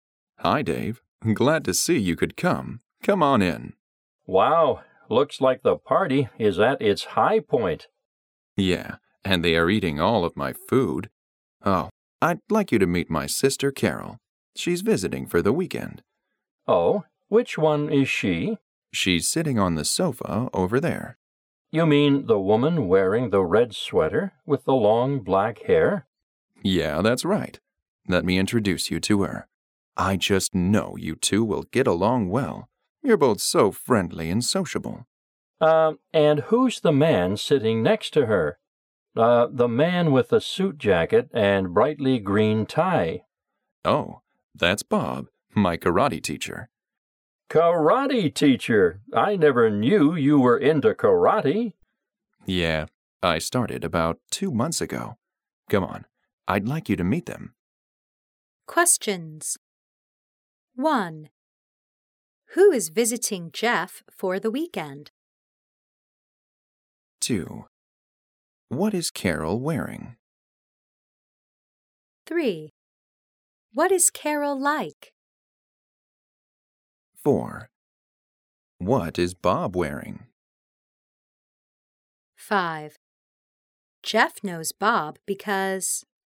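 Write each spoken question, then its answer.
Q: Who is visiting Jeff for the weekend?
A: His sister, Carol

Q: What is Carol wearing?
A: A red sweater

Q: What is Carol like?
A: Friendly and sociable

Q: What is Bob wearing?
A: A suit jacket and a bright green tie

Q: Jeff knows Bob because...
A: Bob is his karate teacher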